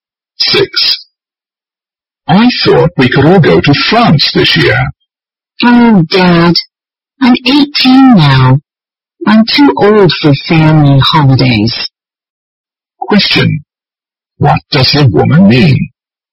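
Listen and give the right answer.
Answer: She doesn't want to go on a family holiday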